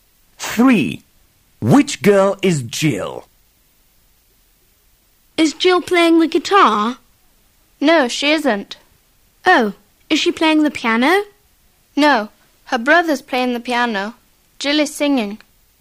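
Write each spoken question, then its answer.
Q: Which girl is Jill?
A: The girl who is singing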